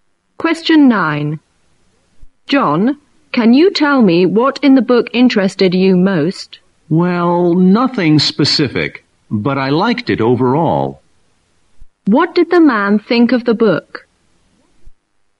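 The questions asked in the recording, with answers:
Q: What did the man think of the book?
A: He liked it overall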